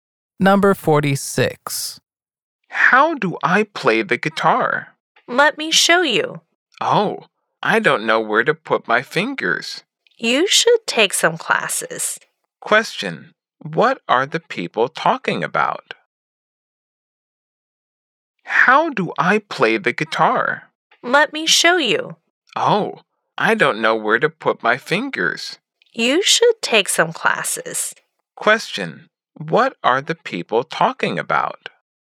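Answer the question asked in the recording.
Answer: How to play the guitar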